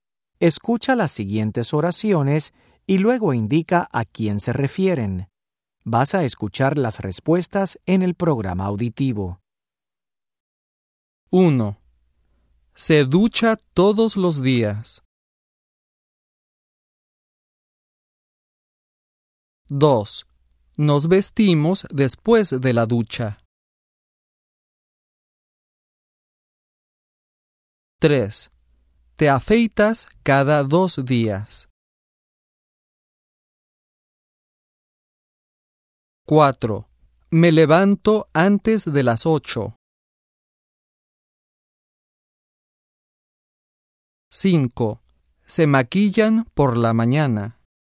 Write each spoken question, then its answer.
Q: Nos vestimos después de la ducha.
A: 2. Nosotros.

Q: Te afeitas cada 2 días.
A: 3. Tú.

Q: Me levanto antes de las 8.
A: 4. Yo.